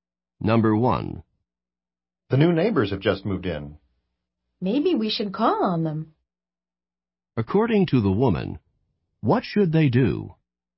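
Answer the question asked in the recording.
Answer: Visit the new neighbors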